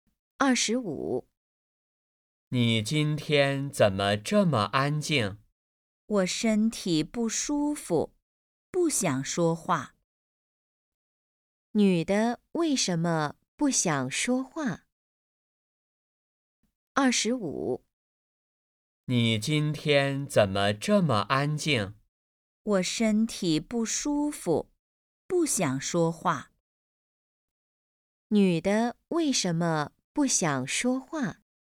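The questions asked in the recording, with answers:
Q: 女的为什么不想说话?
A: 身体不舒服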